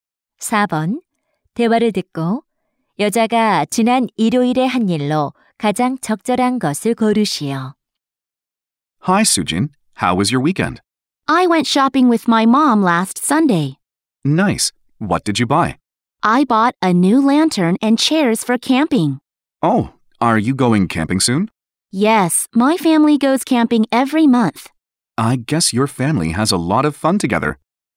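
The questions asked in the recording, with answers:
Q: 대화를 듣고 여자가 지난 일요일에 한 일로 가장 적절한 것을 고르시오.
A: 엄마와 쇼핑하기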